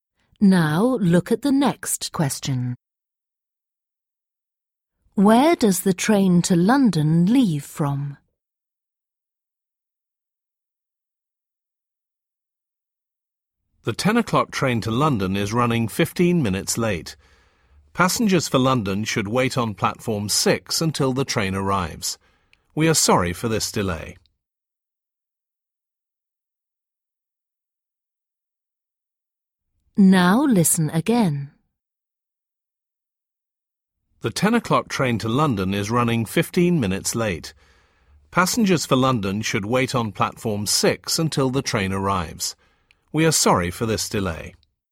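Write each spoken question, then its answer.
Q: Where does the train to London leave from?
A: platform 6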